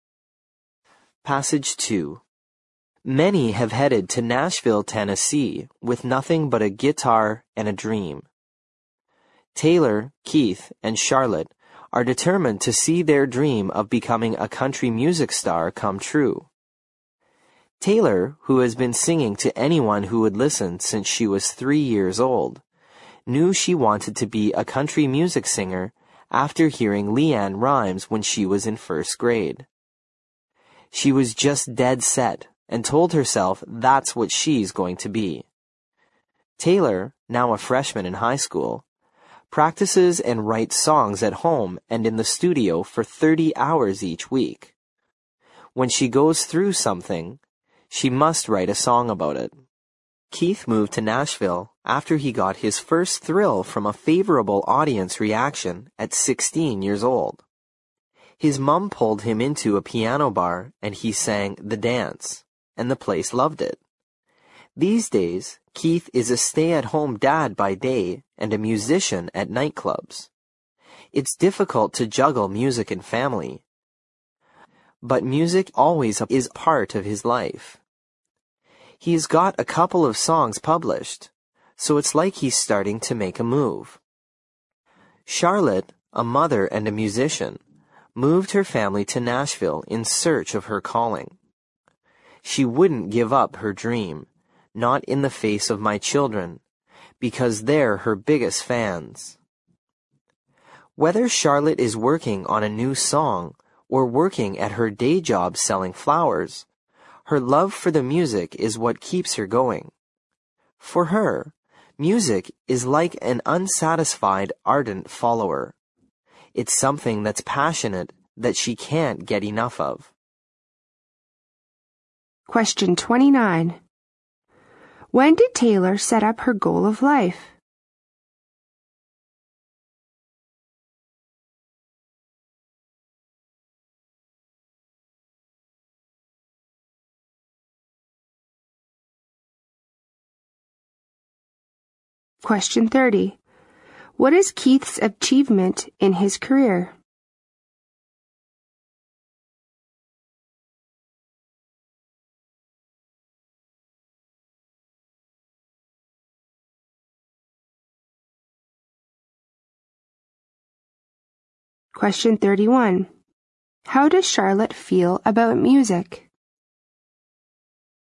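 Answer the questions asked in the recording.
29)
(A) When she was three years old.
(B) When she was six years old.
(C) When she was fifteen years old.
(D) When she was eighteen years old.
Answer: (B) When she was six years old.
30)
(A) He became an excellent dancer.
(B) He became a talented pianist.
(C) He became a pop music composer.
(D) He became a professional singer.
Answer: (C) He became a pop music composer.
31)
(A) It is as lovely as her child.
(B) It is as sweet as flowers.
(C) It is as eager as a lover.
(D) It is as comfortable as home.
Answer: (C) It is as eager as a lover.

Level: 六级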